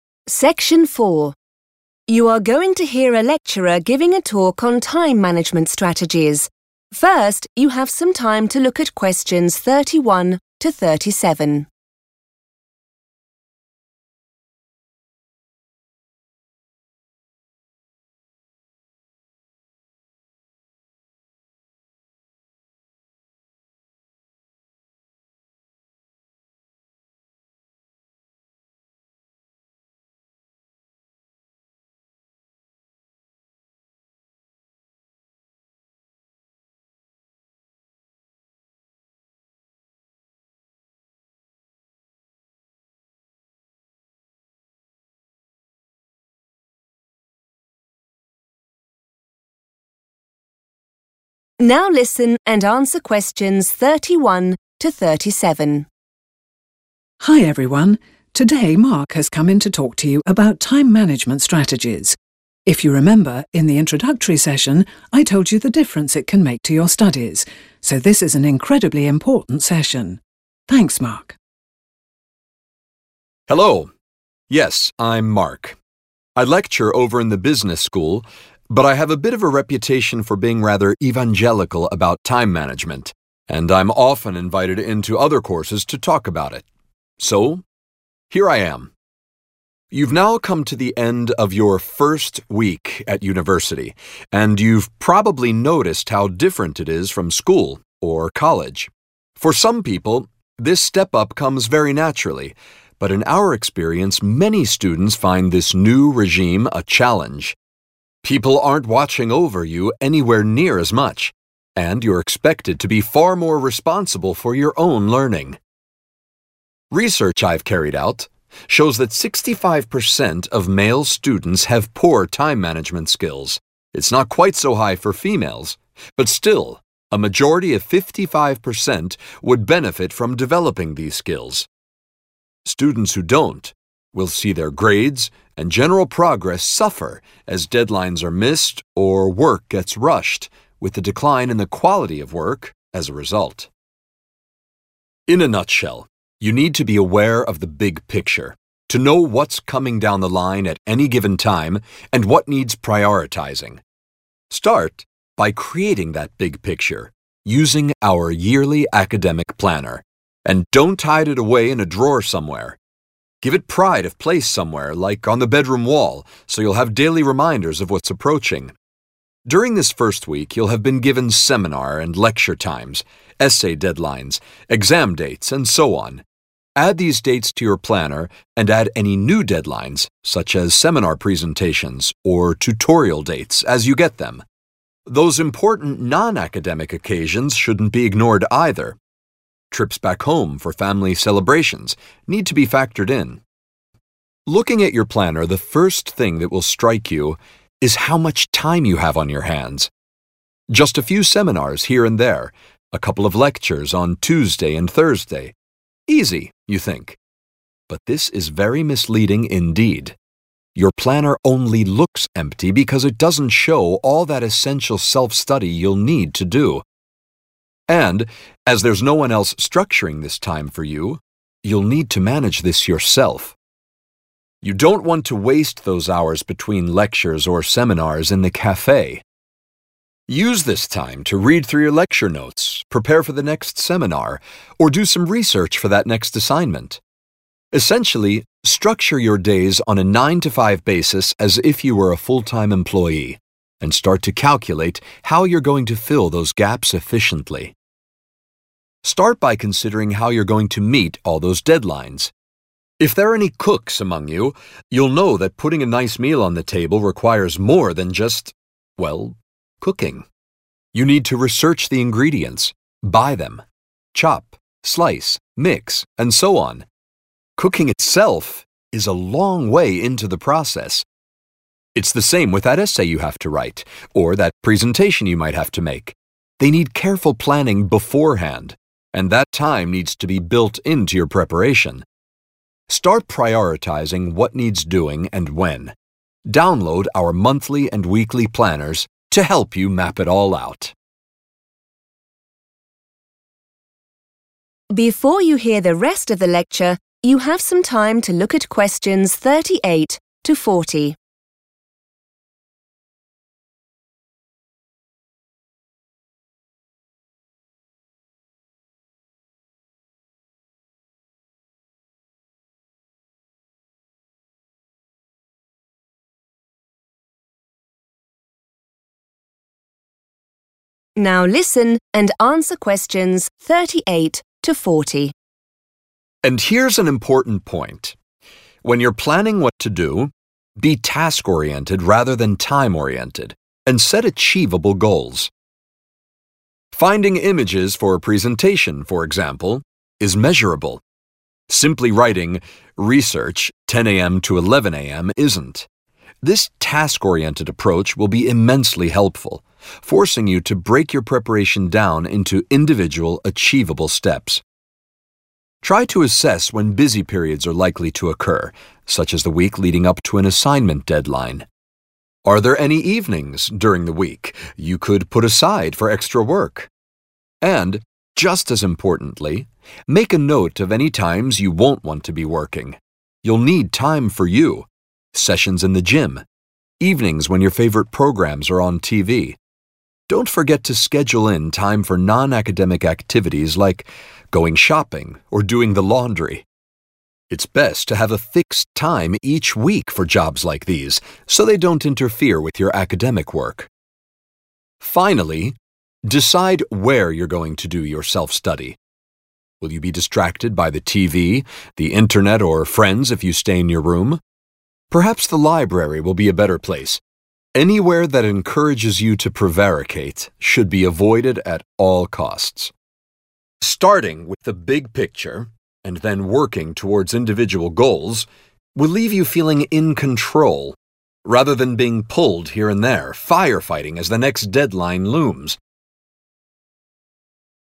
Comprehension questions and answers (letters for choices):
Choose the correct letter, A, B or C.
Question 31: The speaker thinks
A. a university is a similar experience to school or college.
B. students need more tutor support at university.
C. a lot of students have difficulties at university.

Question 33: The speaker thinks it's important that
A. the academic planner is kept safe somewhere.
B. the academic planner is put somewhere it can be seen easily.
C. students remember to collect their academic planner.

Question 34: When filling in the academic planner students should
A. ignore non-academic occasions.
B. try to keep visits home to a minimum.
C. add all important academic and non-academic dates.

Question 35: Initially, the academic planner will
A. give the wrong impression about the amount of work there is.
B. show some days are busier than others.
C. give a clear idea of busy periods.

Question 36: According to the tutor, students should organise their studies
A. so that they have time for coffee breaks.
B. so that they don't miss any seminars or lectures.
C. as if it were a normal working day.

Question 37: The tutor makes the point that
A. cookery students do well when writing essays.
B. cooking and essay writing share certain characteristics.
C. cooking is a complicated process.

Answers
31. C
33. B
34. C
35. A
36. C
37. B

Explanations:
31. The correct answer is C because the speaker, Mark, explains that many students find the change from school to university difficult. He mentions that at university, students are expected to be responsible for their own learning, and many struggle with managing their time. He uses keywords like 'challenge' to describe this and points out that a high percentage of both male and female students have poor time management skills, which can cause their grades to suffer.
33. The correct answer is B because the speaker tells the students not to hide their calendar in a drawer. Instead, he suggests putting it in a main spot, like a bedroom wall. He says this will give them "daily reminders," which means they will see their schedule every day and not forget what they need to do for school.
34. The correct answer is C because Mark tells students to include school events like lectures, exams, and essay deadlines in their academic planner. He also mentions that personal things, which he calls 'non-academic occasions' like family parties, are important and should also be written down so that students can see their whole schedule clearly.
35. The correct answer is A because Mark states that when you first look at your planner, it seems like you have plenty of spare time. He explicitly uses the word 'misleading' to describe this, which means it gives a false idea or impression. This happens because the planner initially only shows formal classes and not the many hours of 'self-study' (work done alone) that are actually required.
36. The correct answer is C because the tutor advises students to treat their time at university with the same discipline as a professional job. Instead of wasting time between classes, he suggests creating a routine that mimics a full-time worker's schedule. Keywords to notice are 'structure', '9–5 basis', and 'full-time employee', which all point to treating studies like a normal working day.
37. The correct answer is B because the tutor uses an analogy, which is a comparison between two things. He explains that to cook a good meal, you have to do many things first, like find ingredients and chop them. He then says it is 'the same' when you have to write an essay. This shows that cooking and essay writing share the quality of needing a lot of planning and preparation.

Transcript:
Tanya: Hi everyone. Today Mark has come in to talk to you about time management strategies. If you remember, in the introductory session I told you the difference it can make to your studies so this is an incredibly important session. Thanks Mark.
Mark: Hello. Yes, I'm Mark. I lecture over in the Business School but I have a bit of a reputation for being rather evangelical about time management and I'm often invited in to other courses to talk about it. So here I am!
You've now come to the end of your first week at university and you've probably noticed how different it is from school or college. For some people this step up comes very naturally but, in our experience, many students find this new regime a challenge. People aren't watching over you anywhere near as much and you're expected to be far more responsible for your own learning. Research I've carried out shows that 65% of male students have poor time management skills. It's not quite so high for females but still a majority of 55% would benefit from developing these skills. Students who don't will see their grades and general progress suffer as deadlines are missed or work gets rushed, with a decline in the quality of work as a result.
In a nutshell, you need to be aware of the big picture, to know what's coming down the line at any given time and what needs prioritising. Start by creating that big picture, using our yearly academic planner. And don't hide it away in a drawer somewhere. Give it pride of place somewhere like on the bedroom wall so you'll have daily reminders of what's approaching. During this first week you'll have been given seminar and lecture times, essay deadlines, exams dates and so on. Add these dates to your planner and add any new deadlines such as seminar presentations or tutorial dates as you get them. Those important non-academic occasions shouldn't be ignored either. Trips back home for family celebrations need to be factored in.
Looking at your planner, the first thing that will strike you is how much time you have on your hands. Just a few seminars here and there, a couple of lectures on Tuesday and Thursday. Easy, you think. But this is very misleading indeed. Your planner only looks empty because it doesn't show all that essential self-study you'll need to do. And as there's no-one else structuring this time for you you'll need to manage this yourself. You don't want to waste those hours between lectures or seminars in the café. Use this time to read through your lecture notes, prepare for the next seminar or do some research for that next assignment. Essentially, structure your days on a 9–5 basis as if you were a full-time employee and start to calculate how you're going to fill those gaps efficiently.
Start by considering how you're going to meet all these deadlines. If there are any cooks amongst you you'll know that putting a nice meal on the table requires more than just ... well, cooking. You need to research the ingredients, buy them, chop, slice, mix and so on. Cooking itself is a long way into the process. It's the same with that essay you have to write or that presentation you might have to make. They need careful planning beforehand and that time needs to be built into your preparation. Start prioritising what needs doing and when. Download our monthly and weekly planners to help you map it all out.
And here's an important point: when you're planning what to do, be task-orientated rather than time-orientated and set achievable goals. 'Finding images for a presentation' for example, is measurable. Simply writing 'research 10 a.m.–11 a.m.' isn't. This task-orientated approach will be immensely helpful, forcing you to break your preparation down into individual, achievable steps.
Try to assess when busy periods are likely to occur such as the week leading up to an assignment deadline. Are there any evenings during the week you could put aside for extra work? And, just as importantly, make a note of any times you won't want to be working. You'll need time for you, sessions in the gym, evenings when your favourite programmes are on TV. Don't forget to schedule in time for non-academic activities like going shopping or doing the laundry. It's best to have a fixed time each week for jobs like these so they don't interfere with your academic work.
Finally, decide where you're going to do your self-study. Will you be distracted by the TV, the Internet or friends if you stay in your room? Perhaps the library will be a better place. Anywhere that encourages you to prevaricate should be avoided at all costs.
Starting with the big picture and then working towards individual goals will leave you feeling in control rather than being pulled here and there, firefighting as the next deadline looms ...